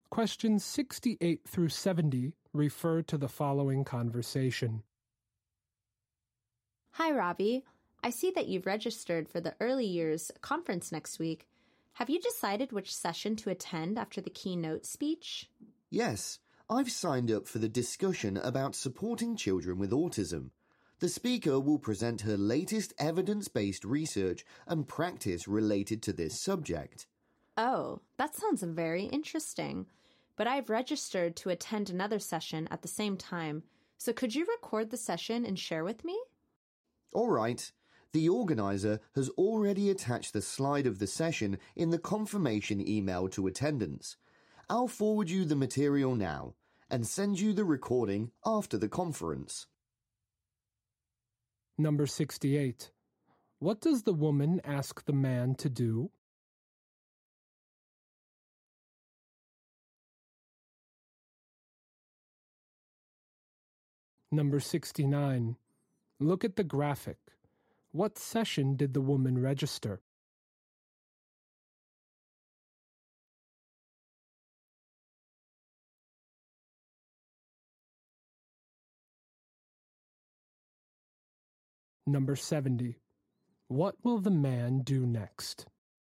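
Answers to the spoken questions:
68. Record the session and share it with her
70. Forward her the session material (slides)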